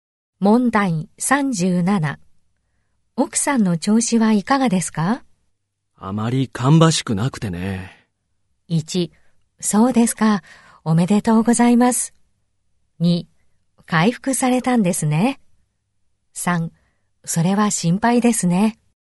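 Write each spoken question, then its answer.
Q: あまり芳しくなくてね。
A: 3: それは心配ですね。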